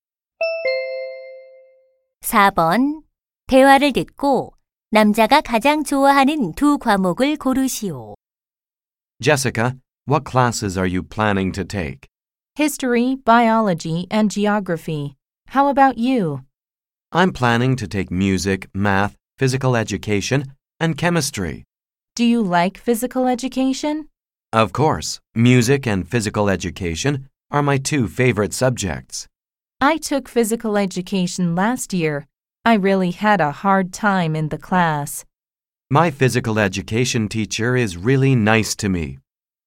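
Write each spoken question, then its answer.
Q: 대화를 듣고 남자가 가장 좋아하는 두 과목을 고르시오.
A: 음악과 체육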